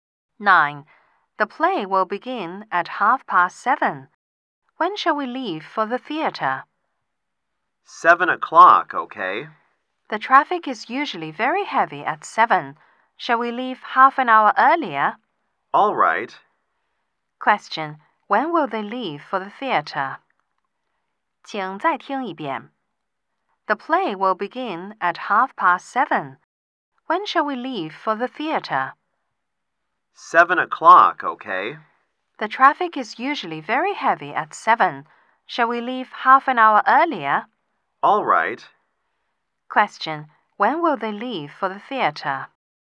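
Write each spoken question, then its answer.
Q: Question. When will they leave for the theater?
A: At 6:30.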